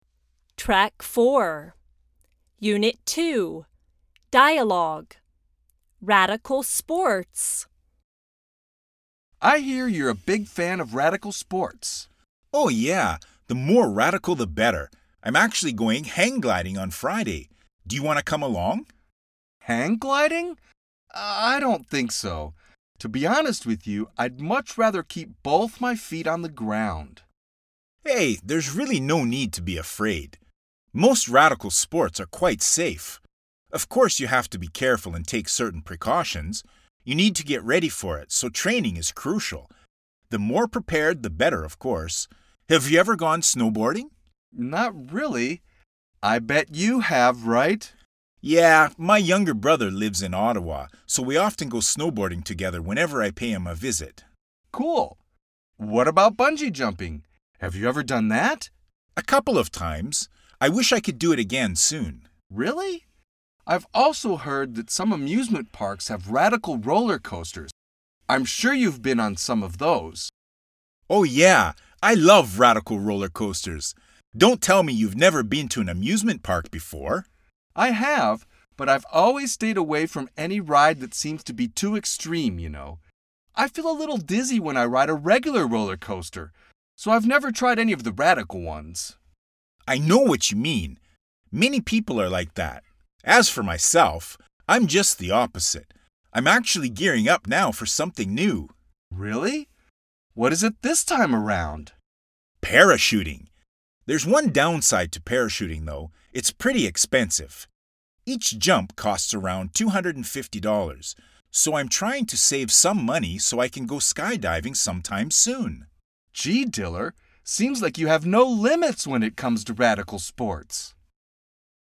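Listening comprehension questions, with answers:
II – DIALOGUE COMPREHENSION: TRUE, FALSE OR I DON ́T KNOW?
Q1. Diller ́s younger brother lives in Australia.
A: False

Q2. Ben and Diller used to be roommates.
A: I don ́t know

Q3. According to Diller most radical sports are safe if you are careful and get ready for them.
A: True

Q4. Ben avoids radical sports.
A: True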